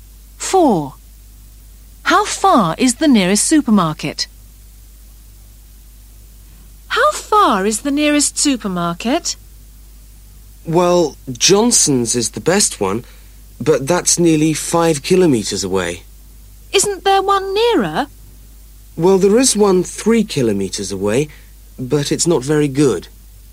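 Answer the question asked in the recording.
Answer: 3 kilometres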